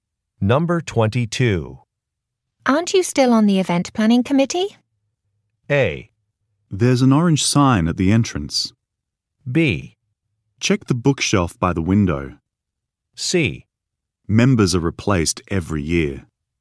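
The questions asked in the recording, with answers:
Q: Aren't you still on the event planning committee?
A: C: Members are replaced every year.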